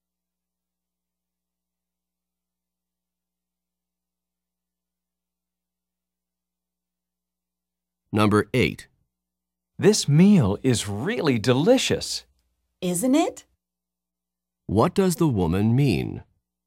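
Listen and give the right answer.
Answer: She agrees the meal is delicious.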